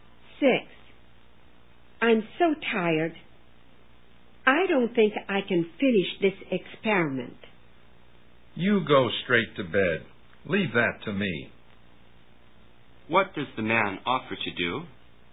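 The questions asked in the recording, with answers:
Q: What does the man offer to do?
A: Finish the experiment for her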